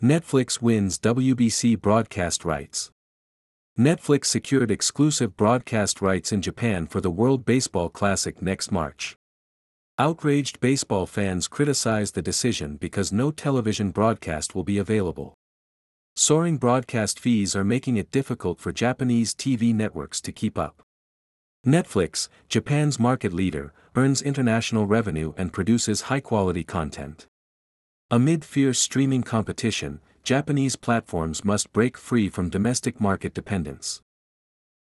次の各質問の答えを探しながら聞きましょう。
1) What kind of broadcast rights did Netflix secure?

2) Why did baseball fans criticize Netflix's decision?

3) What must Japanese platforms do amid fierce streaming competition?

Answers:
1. It secured exclusive broadcast rights in Japan for the World Baseball Classic next March.
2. Because no television broadcast will be available in Japan.
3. They must break free from domestic market dependence.

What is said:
Netflix Wins WBC Broadcast Rights
Netflix secured exclusive broadcast rights in Japan for the World Baseball Classic next March.
Outraged baseball fans criticized the decision because no television broadcast will be available.
Soaring broadcast fees are making it difficult for Japanese TV networks to keep up.
Netflix, Japan's market leader, earns international revenue and produces high-quality content.
Amid fierce streaming competition, Japanese platforms must break free from domestic market dependence.